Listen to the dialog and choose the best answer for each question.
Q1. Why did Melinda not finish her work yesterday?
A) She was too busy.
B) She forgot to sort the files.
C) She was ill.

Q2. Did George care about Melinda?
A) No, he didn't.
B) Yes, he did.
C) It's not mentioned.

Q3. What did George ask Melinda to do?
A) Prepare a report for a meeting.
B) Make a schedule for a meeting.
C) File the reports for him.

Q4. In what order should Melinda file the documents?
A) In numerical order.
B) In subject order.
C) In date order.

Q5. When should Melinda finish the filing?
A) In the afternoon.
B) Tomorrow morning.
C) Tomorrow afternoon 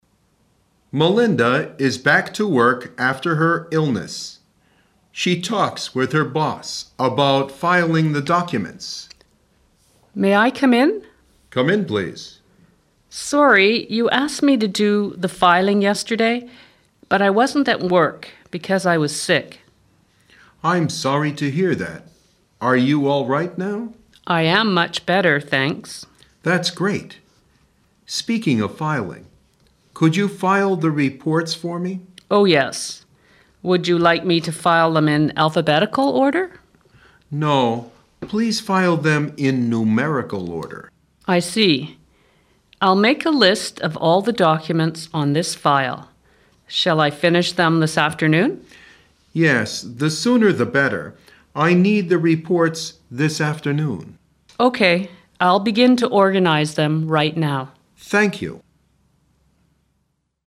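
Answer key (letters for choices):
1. C
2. B
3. C
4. A
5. A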